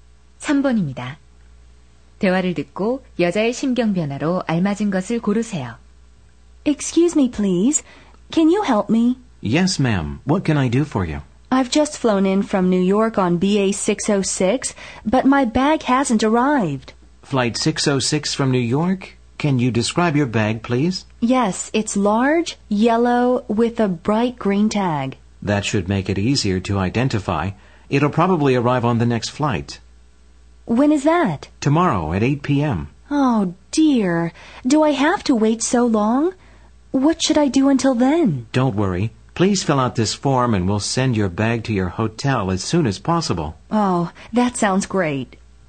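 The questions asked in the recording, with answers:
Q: 대화를 듣고 여자의 심경 변화로 알맞은 것을 고르세요.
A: 걱정스러움 → 안도함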